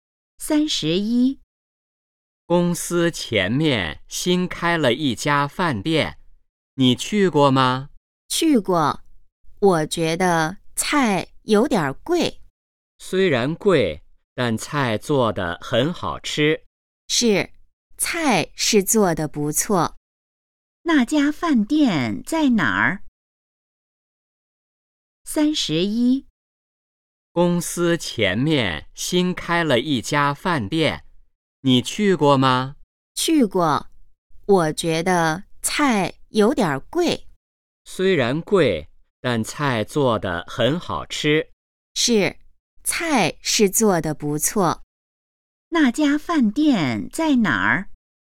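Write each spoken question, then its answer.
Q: 那家饭店在哪儿?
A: 公司前面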